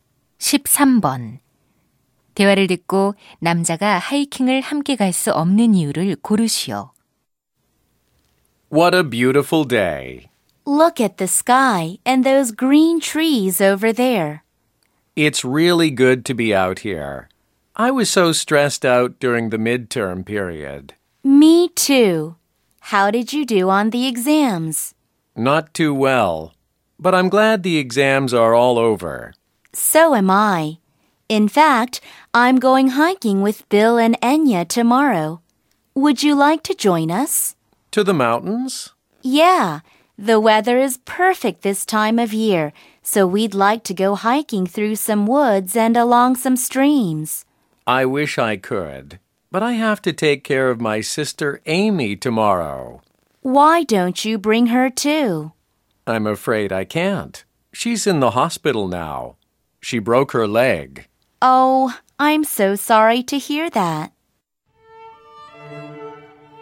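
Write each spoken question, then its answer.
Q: 대화를 듣고 남자가 하이킹을 함께 갈 수 없는 이유를 고르시오.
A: 다리가 부러져 입원한 여동생을 돌봐야 해서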